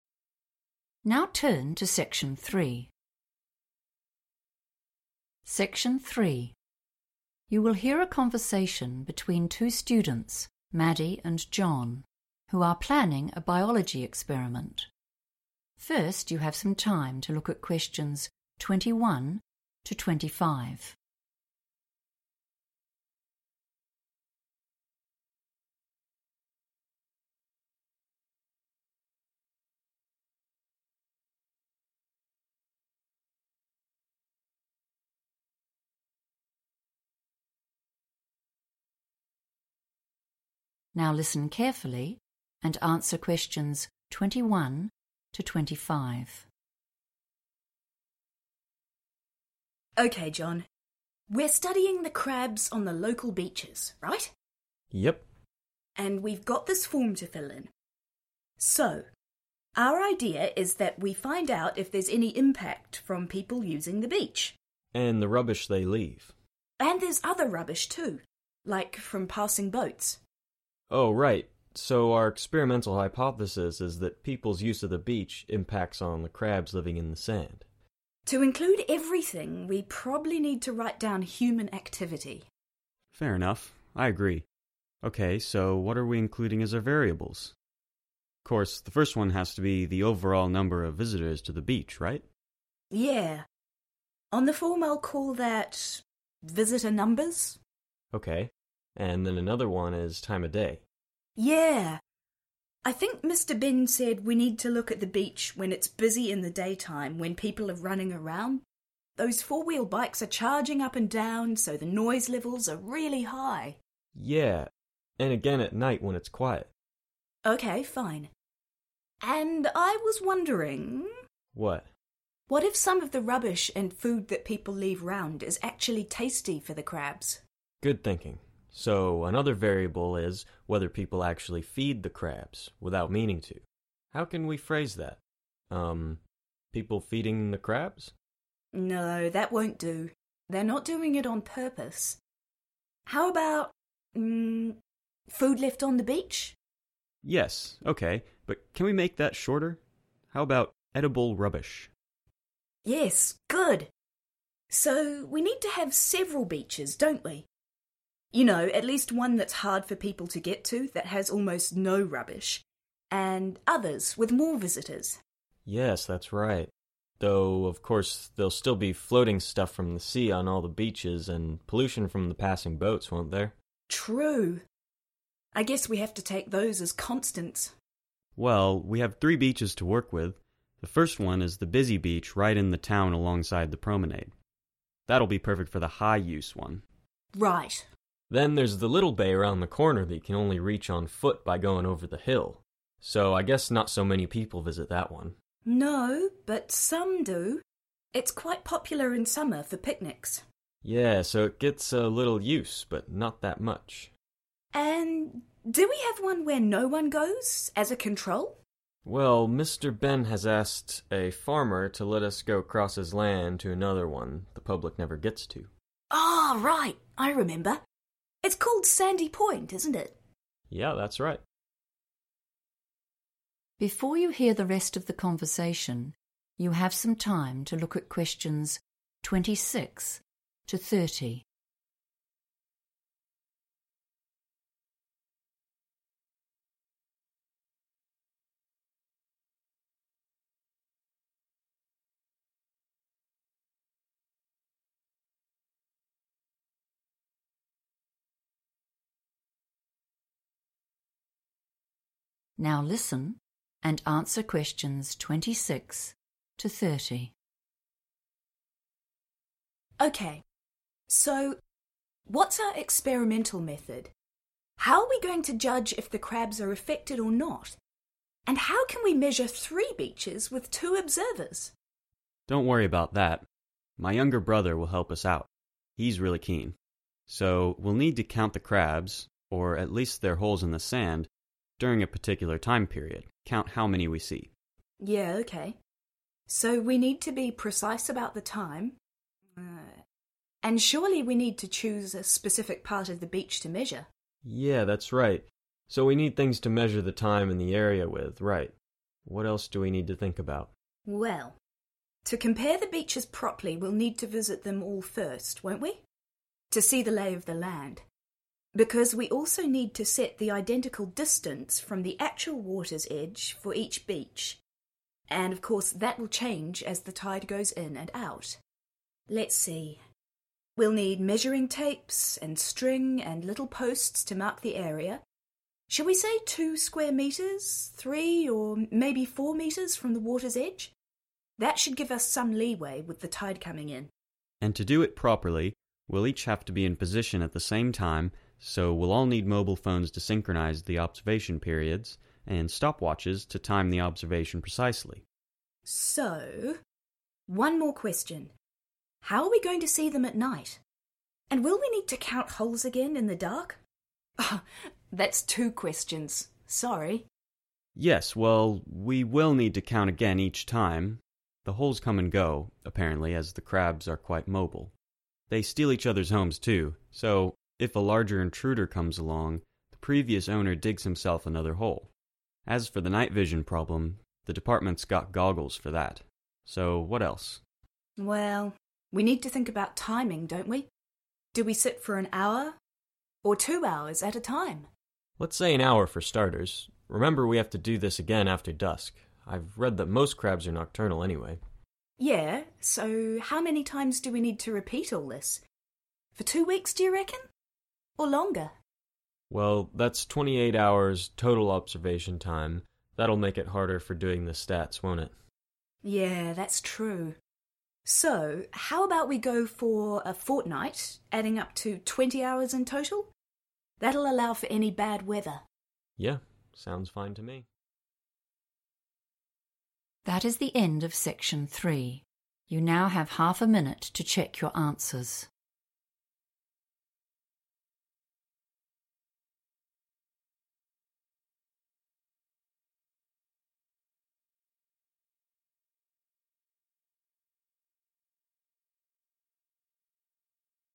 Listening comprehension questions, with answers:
Complete the form below. Write NO MORE THAN TWO WORDS AND/OR A NUMBER for each answer.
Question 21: That _____ impacts on crabs at the beach.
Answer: human activity

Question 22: changes in number of people and _____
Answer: noise levels

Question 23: _____ left by visitors to the beach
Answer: edible rubbish

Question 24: _____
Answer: high use / high-use

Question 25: _____ No use; control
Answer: Sandy Point

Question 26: over a set _____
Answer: time period

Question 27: the same _____ from the sea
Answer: distance

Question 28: _____ to check that we start and stop at the same time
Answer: mobile phones

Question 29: _____ to see at night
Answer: goggles

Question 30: Total observation period: 20 hours over a _____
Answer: fortnight

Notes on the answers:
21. The correct answer is 'human activity' because Maddie says this is the best term to use so that they can include everything they are looking at, like visitors and trash. John agrees with her suggestion. In this context, 'human activity' acts as a summary for both 'people's use of the beach' and the 'rubbish they leave.'
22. The correct answer is "noise levels" because the students discuss how the beach changes between day and night. Maddie points out that when the beach is busy during the day with people and bikes, the "noise levels" are very high, while it is quiet at night. This fits the form's section about variables that change with the time of day.
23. The correct answer is identified as one of the variables the students will track in their experiment. Maddie and John discuss how leftover food from visitors can affect the crabs. Maddie suggests the term 'food left on the beach', but John suggests shortening this to 'edible rubbish' so it fits better on their form, and Maddie agrees.
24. The correct answer is "high use" because John describes the town beach as being very busy. He identifies it as the perfect choice for the beach that researchers will label as having "high use" in their study. This categorizes the beach by its level of human activity.
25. The correct answer is 'Sandy Point' because the students need a beach with no visitors to act as a 'control' for their study. After John mentions a beach that the public cannot go to because it is on private land, Maddie identifies it by name, and John confirms she is correct.
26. The correct answer is determined by listening to John describe the steps of their experiment. He explains that they will count the crabs or the holes they find during a "particular time period." In the planning form, the word "set" is used as a synonym for "particular," meaning a fixed or specific length of time.
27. The correct answer is 'distance' because Maddie states that for the experiment to be fair and accurate, the researchers must use the same separation from the water at every beach. She uses the word 'identical' as a synonym for 'the same' and 'water's edge' for 'the sea.'
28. The correct answer is 'mobile phones' because John specifically mentions them as the equipment needed so that all observers are in position and starting at the same moment. He uses the word 'synchronise,' which means to make something happen at the exactly the same time, matching the phrase in the form: 'check that we start and stop at the same time.'
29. The correct answer is identified through a discussion between Maddie and John about how to conduct their experiment during the night. Maddie expresses concern about how they will be able to see the crabs in the dark. John responds by saying that the teaching department has goggles available to solve this night vision problem. These goggles are the physical equipment they will use to see at night.
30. The correct answer is derived from the speakers' discussion about the length of their experiment. While they initially mention "two weeks," they agree on a specific total of 20 hours over a "fortnight." This matches the form's requirement for a time duration that spans the observation period.

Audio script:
MADDIE: OK, John. We're studying the crabs on the local beaches, right?
JOHN: Yep.
MADDIE: And we've got this form to fill in. So, our idea is that we find out if there's any impact from people using the beach ...
JOHN: ... and the rubbish they leave.
MADDIE: And there's other rubbish too, like from passing boats.
JOHN: Oh, right ... so our experimental hypothesis is that people's use of the beach impacts on the crabs living in the sand.
MADDIE: To include everything we probably need to write down human activity.
JOHN: Fair enough, I agree. OK, so what are we including as our variables? Of course, the first one has to be the overall number of visitors to the beach, right?
MADDIE: Yeah, on the form I'll call that ... visitor numbers.
JOHN: OK ... and then another one is time of day...
MADDIE: ...yeah, I think Mr Benn said we need to look at the beach when it's busy in the daytime, when people are running around, those four-wheel bikes are charging up and down, so the noise levels are really high...
JOHN: Yeah....and again at night when it's quiet.
MADDIE: OK fine....and I was wondering...
JOHN: What?
MADDIE: What if some of the rubbish and food that people leave around is actually tasty for the crabs?
JOHN: Good thinking. So, another variable is whether people actually feed the crabs, without meaning to. How can we phrase that? Um ... people feeding the crabs?
MADDIE: No, that won't do, they're not doing it on purpose ... How about ... food left on the beach?
JOHN: Yes OK, but can we make that shorter? How about ... edible rubbish?
MADDIE: Yes, good ... So, we need to have several beaches, don't we? ...
You know, at least one that's hard for people to get to, that has almost no rubbish, and others with more visitors.
JOHN: Yes, that's right ... though of course there'll still be floating stuff from the sea on all the beaches, and pollution from passing boats, won't there?
MADDIE: True ... I guess we have to take those as constants.
JOHN: Well, we have three beaches to work with — the first one is the busy beach right in the town alongside the promenade. That'll be perfect for the high use one.
MADDIE: Right.
JOHN: Then, there's the little bay round the corner that you can only reach on foot by going over the hill, so I guess not so many people visit that one.
MADDIE: No, but some do. It's quite popular in summer for picnics.
JOHN: Yeah, so it gets a little use, but not that much.
MADDIE: And do we have one where no one goes, as a control?
JOHN: Well, Mr Benn has asked a farmer to let us go across his land to another one the public never gets to.
MADDIE: Oh, right, I remember. It's called Sandy Point, isn't it?
JOHN: Yeah, that's right.
So, what's our experimental method? How are we going to judge if the crabs are affected or not? And how can we measure three beaches with two observers?
JOHN: Don't worry about that; my younger brother will help us out. He's really keen. So, we'll need to count the crabs – or at least their holes in the sand – during a particular time period, count how many we see.
MADDIE: Yeah OK, so we need to be precise about the time, uh, and surely we need to choose a specific part of the beach to measure?
JOHN: Yeah that's right. So we need things to measure the time and the area with, right ... what else do we need to think about?
MADDIE: Well, to compare the beaches properly we'll need to visit them all first, won't we? To see the lay of the land. Because we also need to set the identical distance from the actual water's edge, for each beach ... and of course that will change as the tide goes in and out. Let's see ... we'll need measuring tapes and string and little posts to mark the area – shall we say two square metres, three or maybe four metres from the water's edge? That should give us some leeway with the tide coming in.
JOHN: And to do it properly, we'll each have to be in position at the same time, so we'll all need mobile phones to synchronise the observation periods, and stop watches to time the observation precisely.
MADDIE: So .... one more question ... how are we going to see them at night? And will we need to count holes again, in the dark? Oh, that's 2 questions, sorry!
JOHN: Yes, well, we will need to count again each time ... the holes come and go, apparently, as the crabs are quite mobile – they steal each others' homes too, so if a larger intruder comes along, the previous owner digs himself another hole. As for the night vision problem, the department's got goggles for that – so, what else?
MADDIE: Well, we need to think about timing, don't we? Do we sit for an hour ... or two hours ...at a time?
JOHN: Let's say an hour for starters. Remember we have to do this again after dusk – I've read that most crabs are nocturnal anyway.
MADDIE: Yeah, so how many times do we need to repeat all this? For two weeks, d'you reckon? Or longer?
JOHN: Well, that's 28 hours' total observation time; that'll make it harder for doing the stats, won't it?
MADDIE: Yeah, that's true. So how about we go for a fortnight, adding up to 20 hours in total. That'll allow for any bad weather.
JOHN: Yeah ... sounds fine to me ...